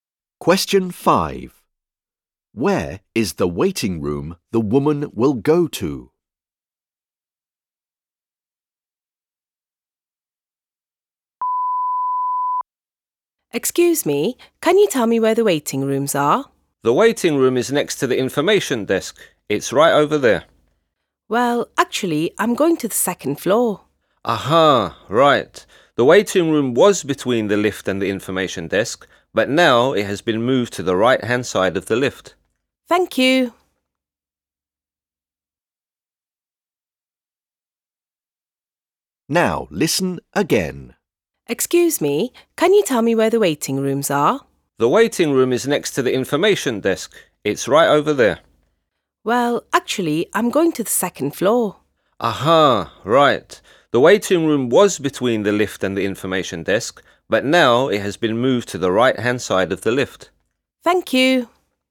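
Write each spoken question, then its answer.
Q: Where is the waiting room the woman will go to?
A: On the right-hand side of the lift (second floor)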